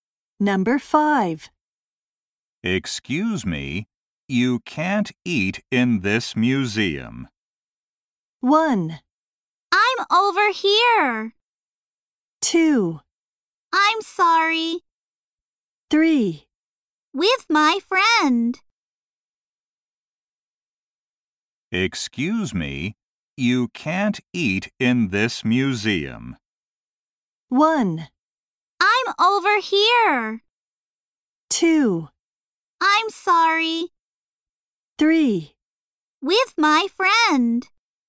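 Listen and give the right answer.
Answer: 2: I'm sorry.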